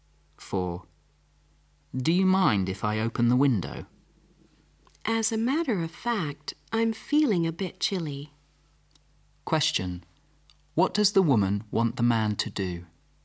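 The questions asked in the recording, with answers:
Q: What does the woman want the man to do?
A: Not to open the window.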